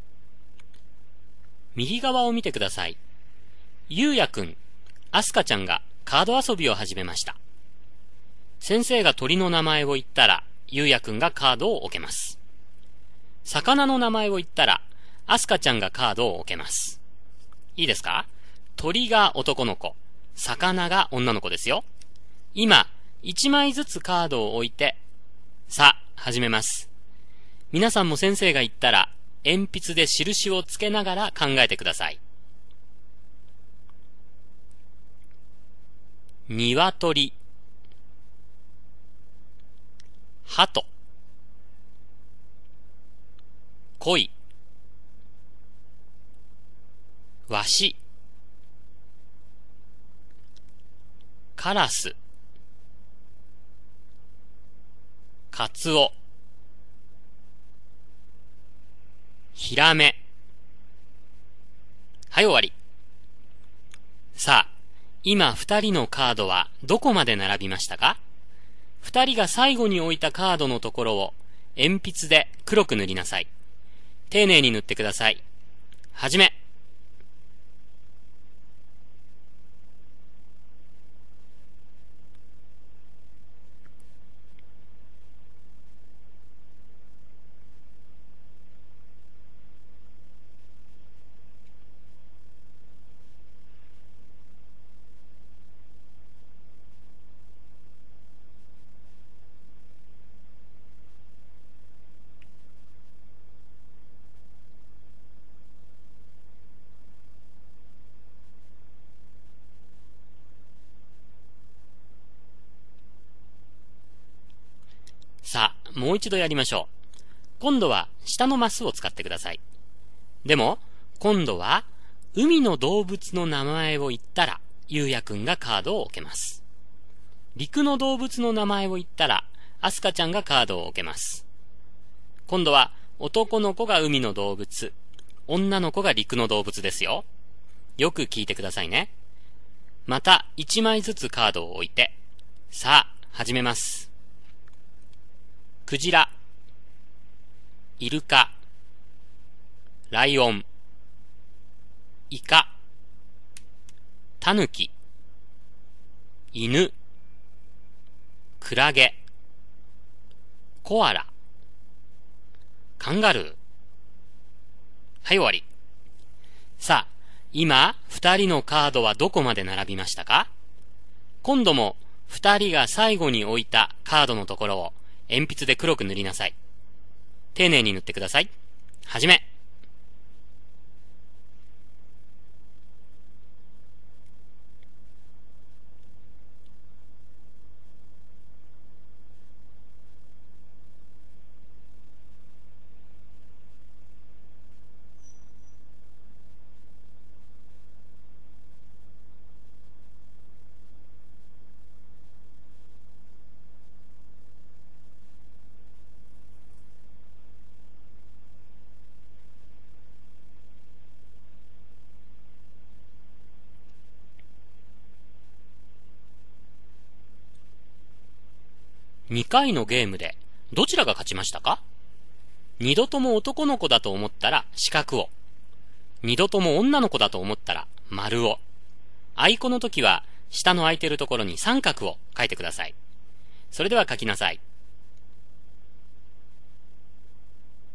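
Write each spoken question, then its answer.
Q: 2回のゲームでどちらが勝ちましたか?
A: あいこ(1回目は男の子、2回目は女の子が勝った)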